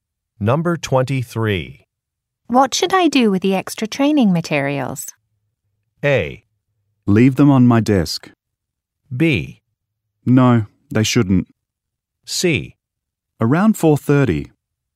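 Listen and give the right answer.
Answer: A: Leave them on my desk.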